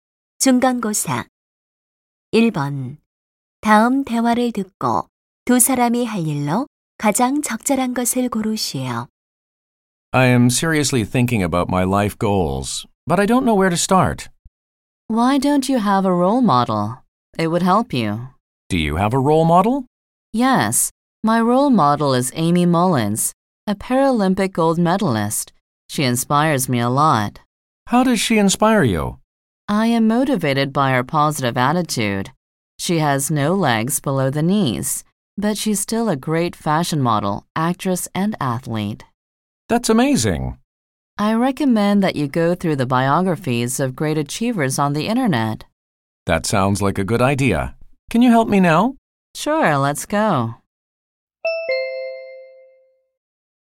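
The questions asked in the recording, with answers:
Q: 다음 대화를 듣고 두 사람이 할 일로 가장 적절한 것을 고르시오.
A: 인터넷에서 위대한 성취자들의 전기 찾아보기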